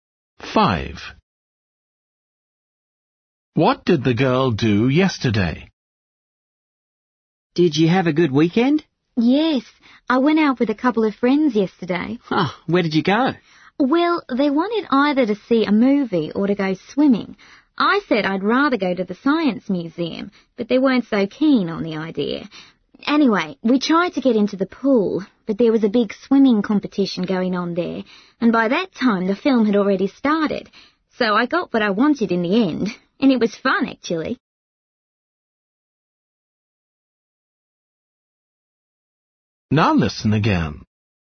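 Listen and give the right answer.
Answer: went to the science museum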